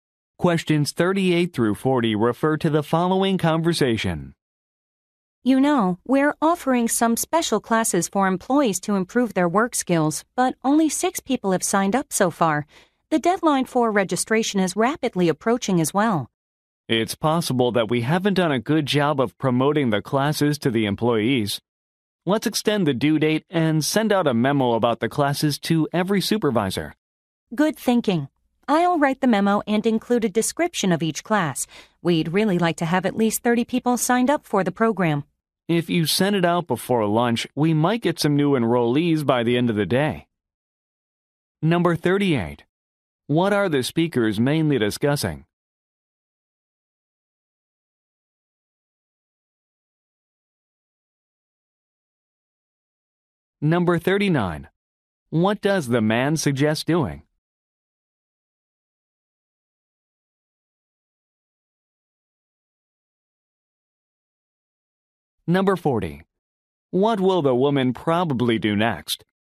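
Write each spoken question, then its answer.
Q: What are the speakers mainly discussing?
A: Special training classes for employees

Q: What does the man suggest doing?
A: Extending the deadline and sending a memo to supervisors

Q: What will the woman probably do next?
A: Write the memo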